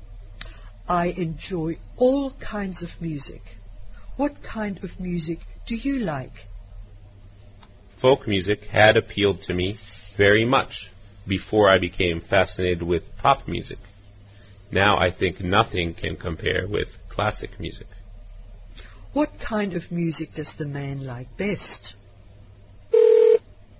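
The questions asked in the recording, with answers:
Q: What kind of music does the man like best?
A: Classical music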